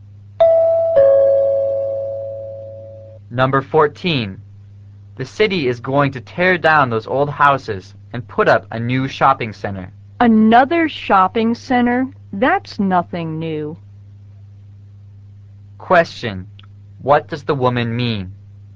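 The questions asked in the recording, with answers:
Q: What does the woman mean?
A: A new shopping center is nothing unusual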